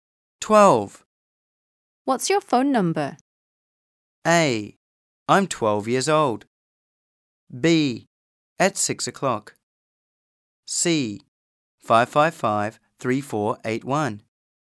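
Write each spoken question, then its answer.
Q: What's your phone number?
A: C: 555-3481.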